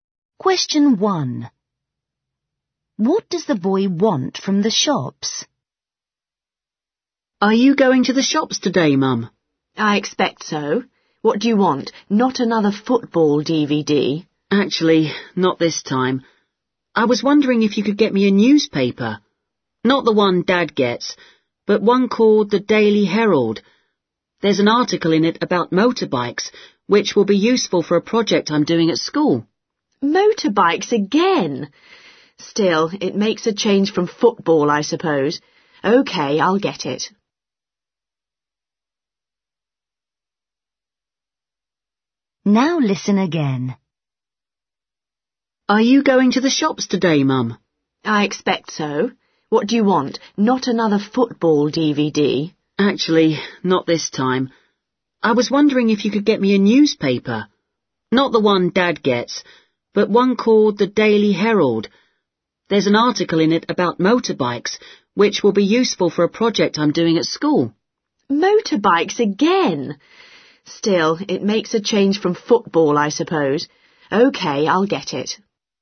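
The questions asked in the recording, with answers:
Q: What does the boy want from the shops?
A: a newspaper (the Daily Herald)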